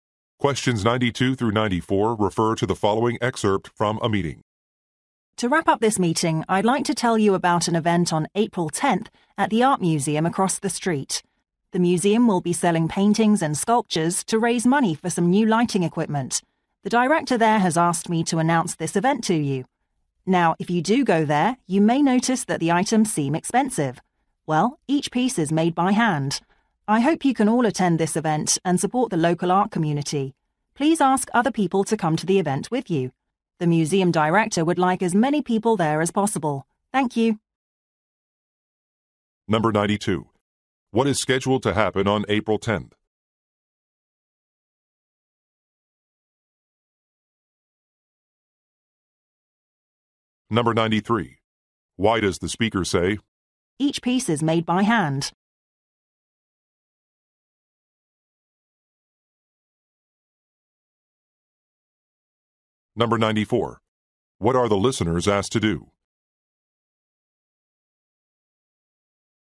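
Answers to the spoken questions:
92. An art sale at the museum to raise money
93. To explain why the items are expensive
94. Bring other people to the event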